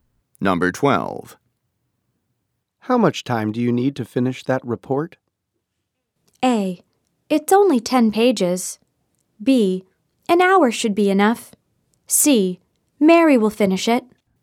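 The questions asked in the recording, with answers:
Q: How much time do you need to finish that report?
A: B: An hour should be enough.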